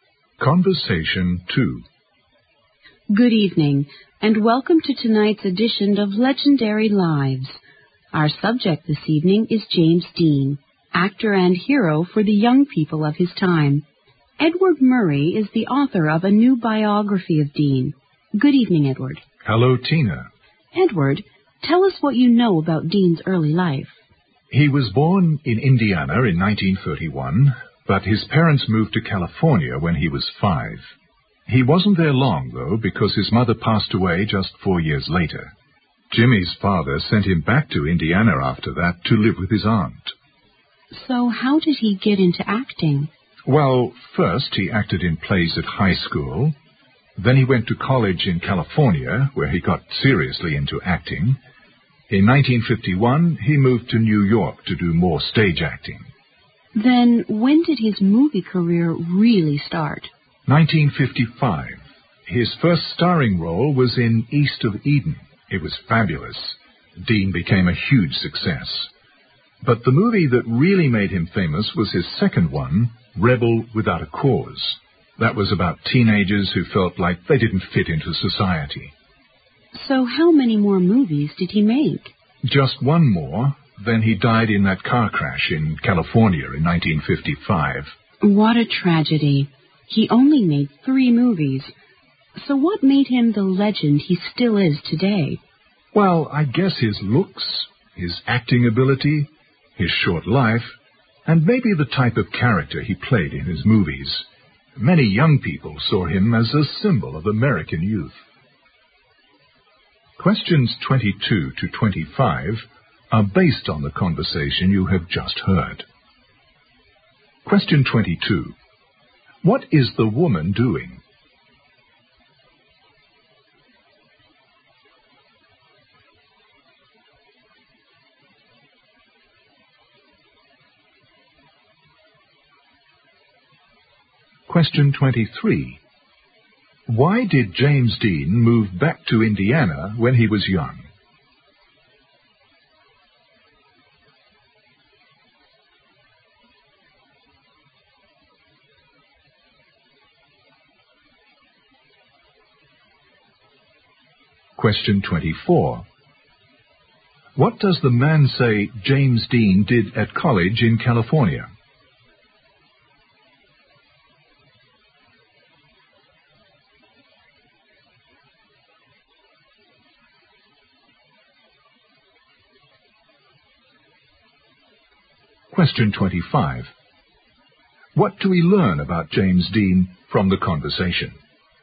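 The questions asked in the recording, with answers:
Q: What is the woman doing?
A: Hosting a TV program, interviewing the author of a biography of James Dean

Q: Why did James Dean move back to Indiana when he was young?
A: His mother died, and his father sent him to live with his aunt.

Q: What does the man say James Dean did at college in California?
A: He got seriously into acting.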